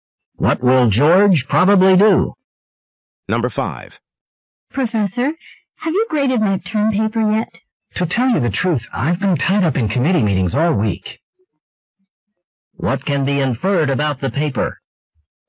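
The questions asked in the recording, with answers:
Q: What can be inferred about the paper?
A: It hasn't been graded yet.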